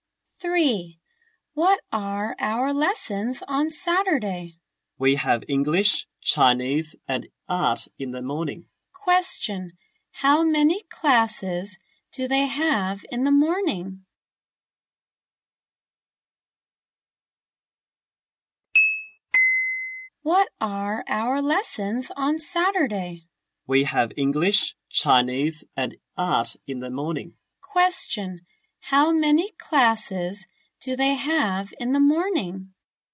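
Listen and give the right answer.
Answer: Three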